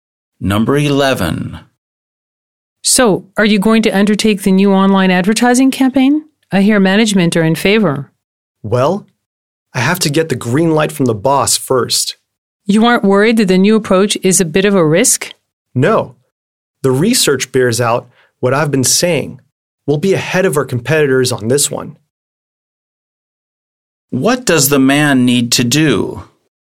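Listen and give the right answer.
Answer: Get approval from the boss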